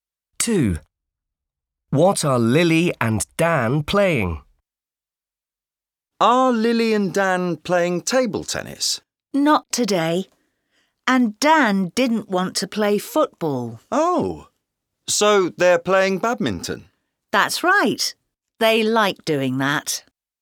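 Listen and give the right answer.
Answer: badminton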